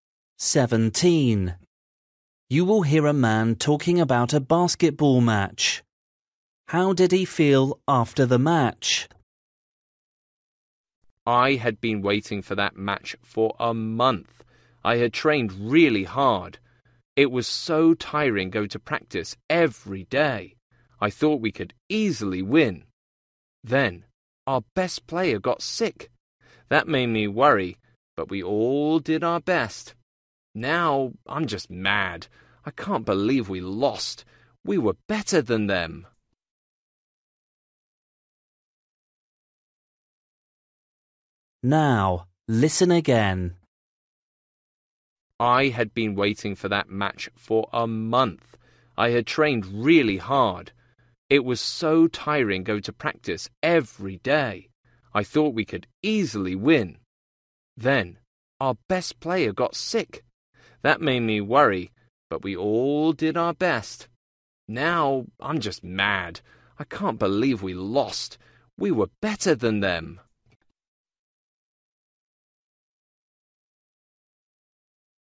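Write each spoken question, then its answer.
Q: How did he feel after the match?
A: Angry (mad) because they lost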